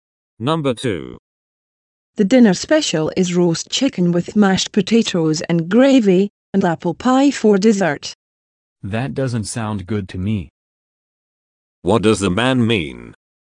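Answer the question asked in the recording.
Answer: He doesn't like the dinner special.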